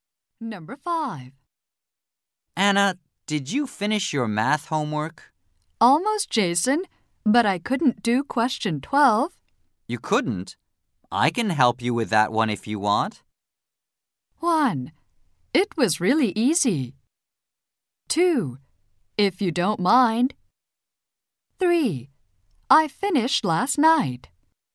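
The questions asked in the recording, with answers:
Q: You couldn't? I can help you with that one if you want.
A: 2: If you don't mind.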